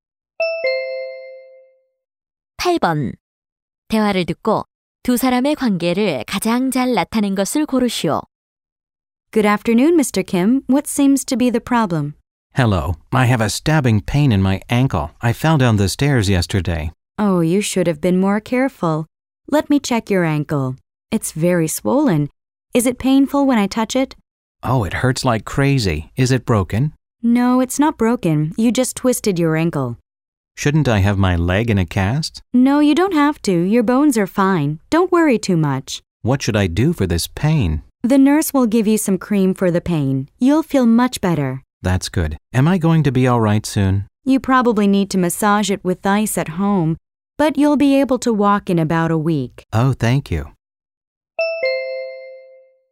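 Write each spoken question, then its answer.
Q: 대화를 듣고 두 사람의 관계를 가장 잘 나타낸 것을 고르시오.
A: 의사와 환자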